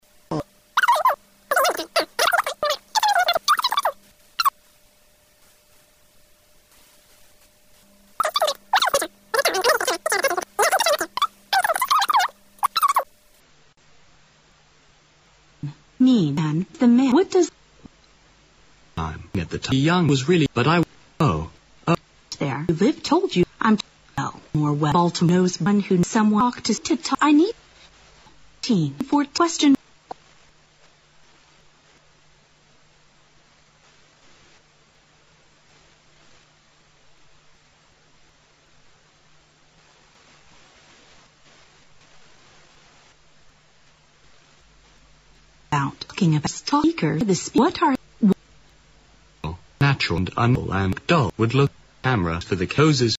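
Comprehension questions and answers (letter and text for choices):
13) What are the speakers talking about?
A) Taking photographs.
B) Enhancing images.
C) Mending cameras.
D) Painting pictures.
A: A) Taking photographs.

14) What does the man mean?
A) He moved to Baltimore when he was young.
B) He can provide little useful information.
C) He will show the woman around Baltimore.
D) He will ask someone else to help the woman.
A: B) He can provide little useful information.

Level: 大学英语四级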